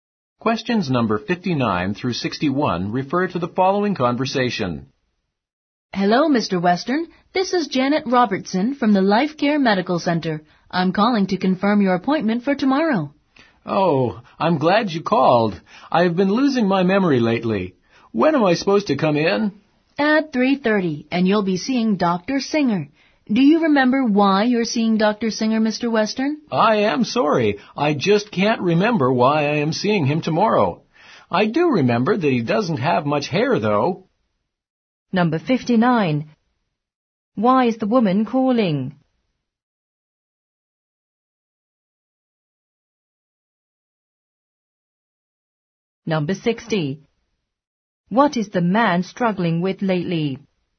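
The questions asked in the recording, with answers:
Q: Why is the woman calling?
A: To confirm his appointment for tomorrow

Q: What is the man struggling with lately?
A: Losing his memory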